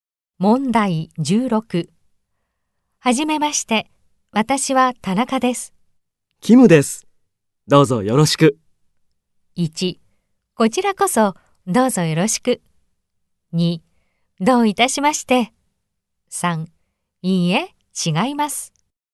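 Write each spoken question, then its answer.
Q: はじめまして。私は田中です。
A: 1: こちらこそどうぞよろしく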